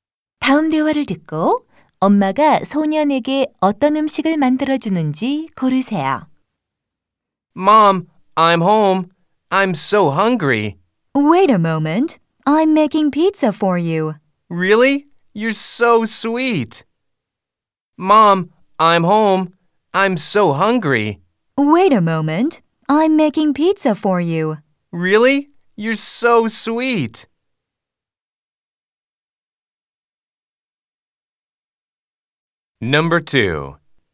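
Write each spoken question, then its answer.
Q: 다음 대화를 듣고 엄마가 소년에게 어떤 음식을 만들어 주는지 고르세요.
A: 피자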